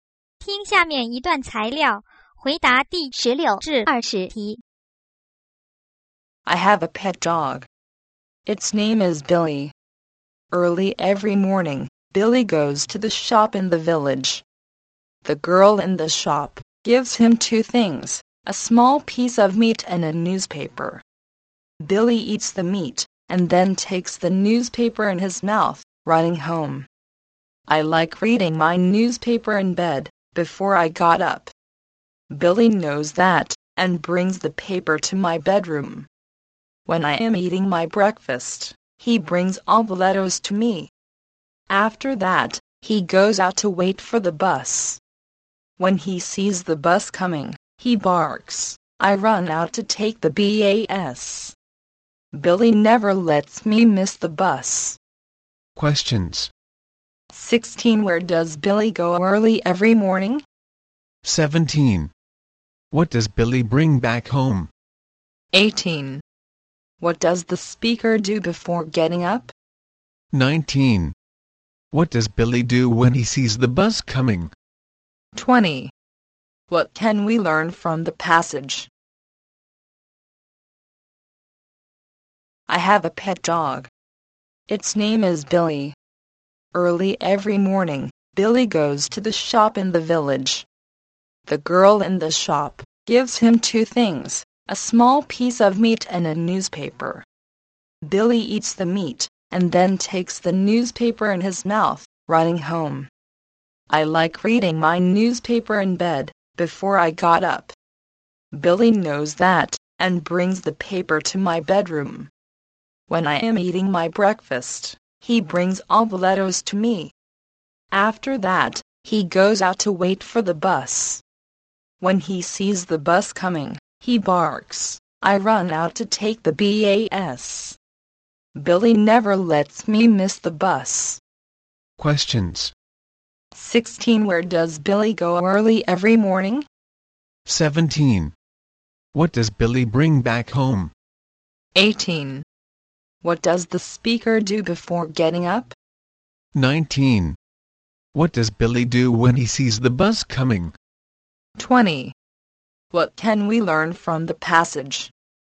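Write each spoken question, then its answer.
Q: Where does Billy go early every morning?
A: To the shop in the village

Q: What does Billy bring back home?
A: A newspaper

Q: What does the speaker do before getting up?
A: Reads the newspaper in bed

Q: What does Billy do when he sees the bus coming?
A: He barks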